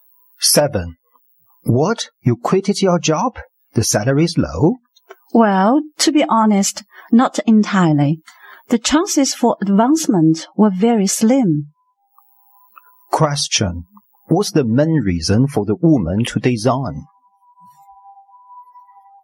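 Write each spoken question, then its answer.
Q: What's the main reason for the woman to resign?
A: There was little chance for advancement.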